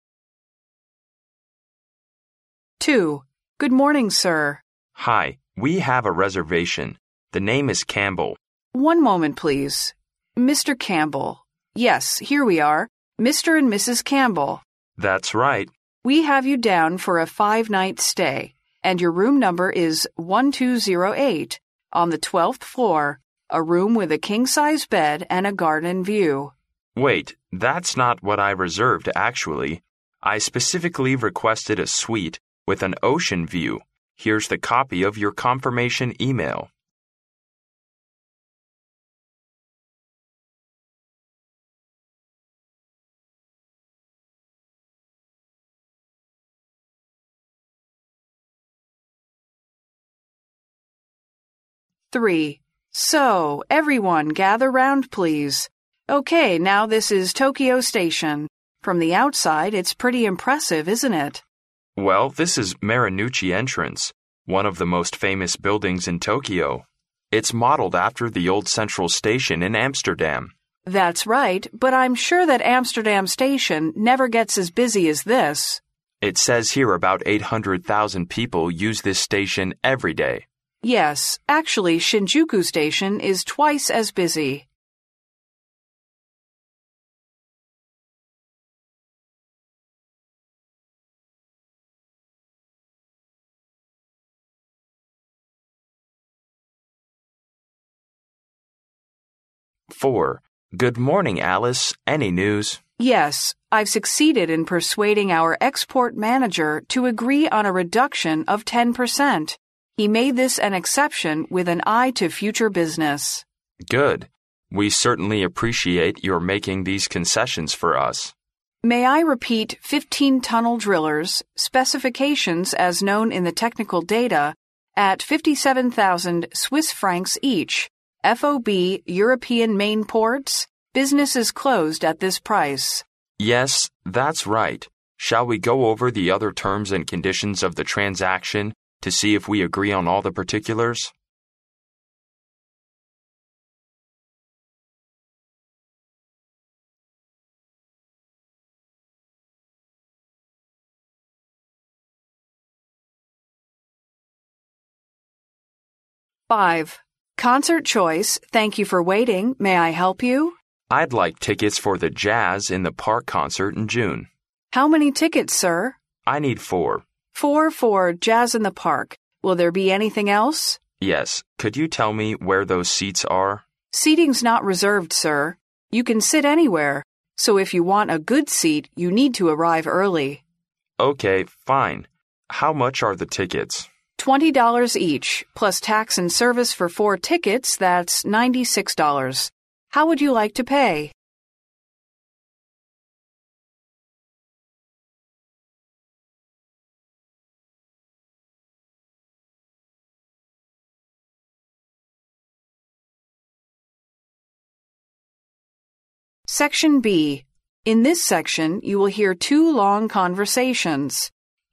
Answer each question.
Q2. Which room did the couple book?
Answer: A suite with an ocean view.

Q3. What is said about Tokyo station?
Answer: It is modeled after Amsterdam central station.

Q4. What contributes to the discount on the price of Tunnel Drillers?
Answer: Future business transactions.

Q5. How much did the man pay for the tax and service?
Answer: $16.